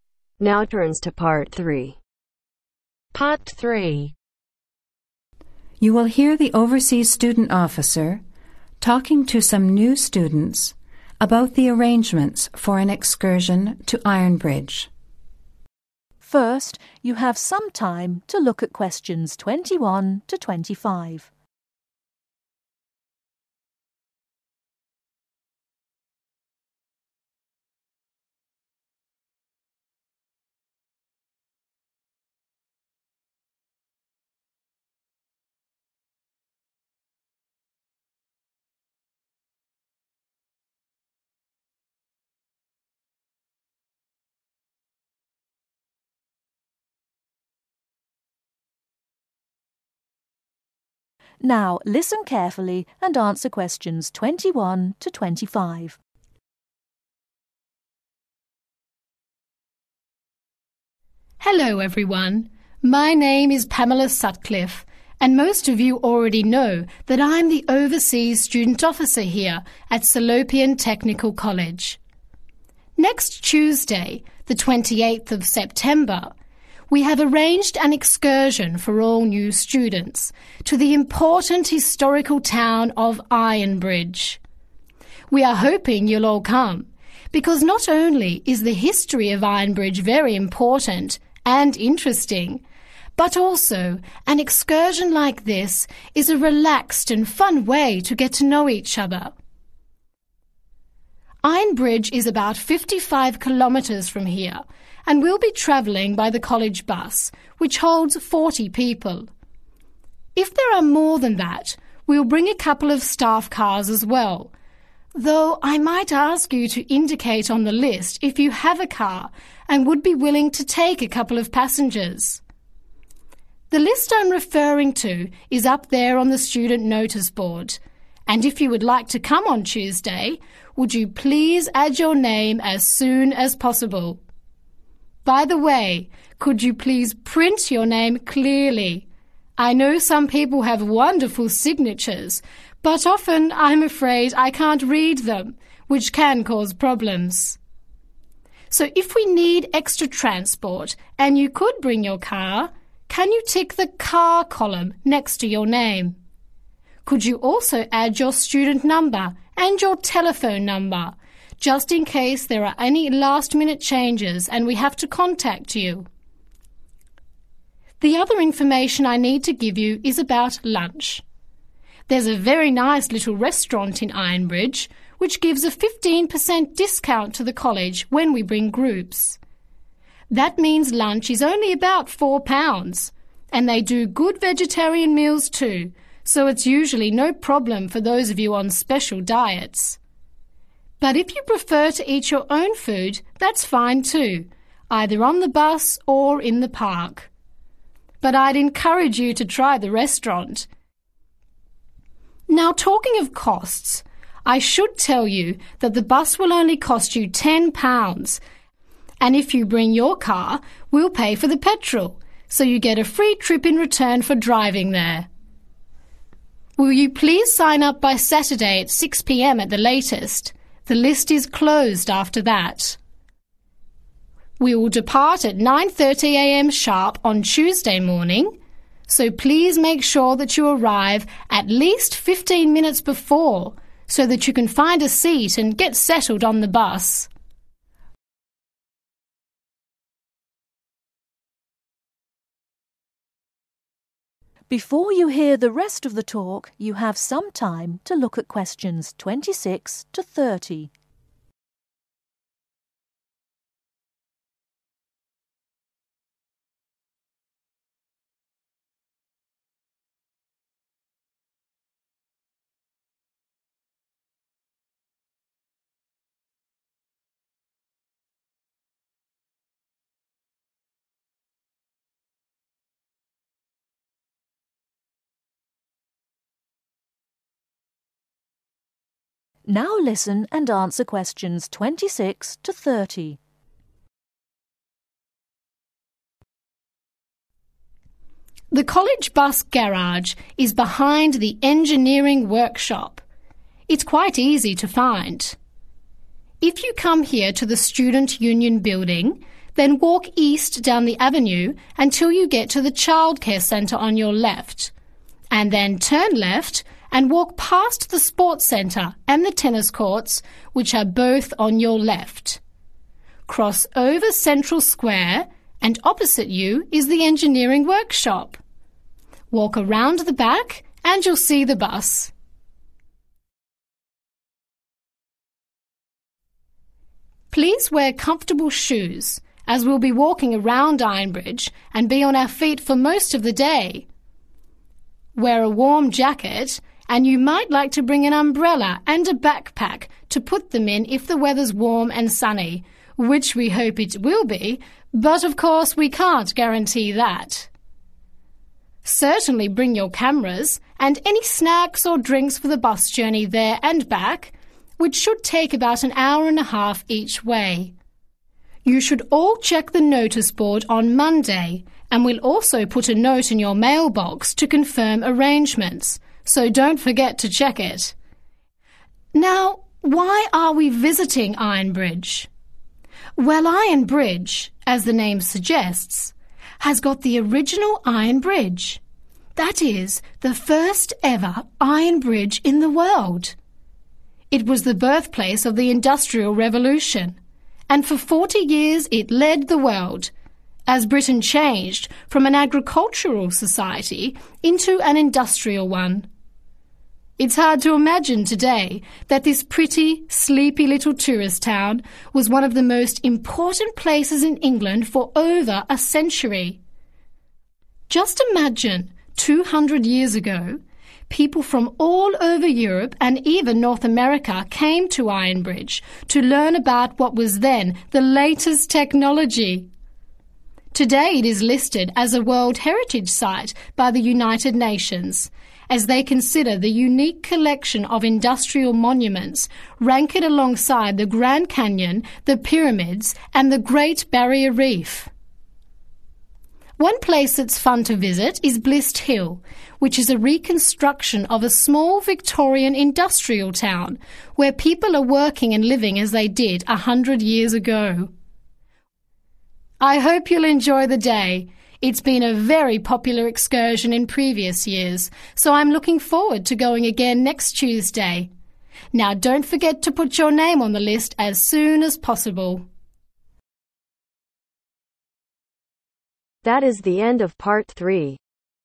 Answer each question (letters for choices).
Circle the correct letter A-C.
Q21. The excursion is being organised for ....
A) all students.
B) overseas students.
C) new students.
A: C

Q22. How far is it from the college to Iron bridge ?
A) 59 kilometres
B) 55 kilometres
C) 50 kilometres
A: B

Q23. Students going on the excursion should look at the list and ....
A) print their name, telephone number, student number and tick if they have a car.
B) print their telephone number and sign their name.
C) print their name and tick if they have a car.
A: A

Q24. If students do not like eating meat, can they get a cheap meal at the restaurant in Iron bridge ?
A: YES

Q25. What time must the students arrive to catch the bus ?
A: 9.15 AM

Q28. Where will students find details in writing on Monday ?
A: NOTICE BOARD/MAIL BOX